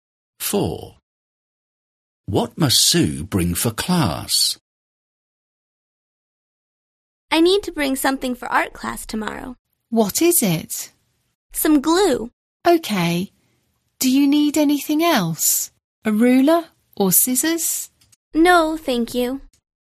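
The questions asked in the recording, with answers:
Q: What must Sue bring for class?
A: some glue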